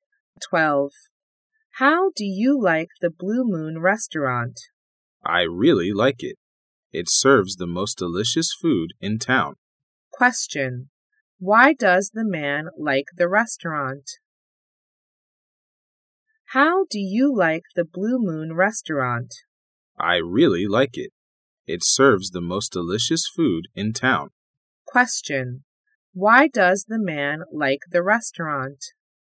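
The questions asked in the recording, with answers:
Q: Why does the man like the restaurant?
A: It serves the most delicious food in town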